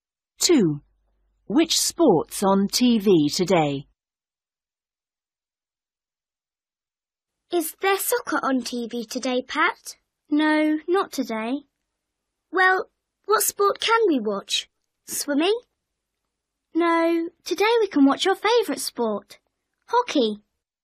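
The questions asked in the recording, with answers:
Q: Which sport's on TV today?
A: Hockey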